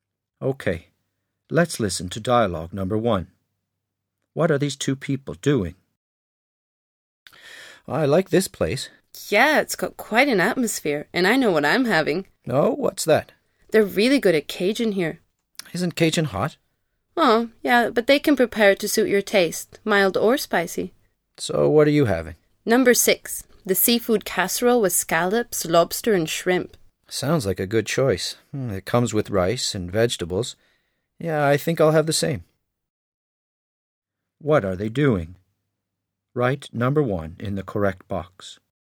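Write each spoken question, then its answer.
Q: What are these two people doing?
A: Ordering food in a restaurant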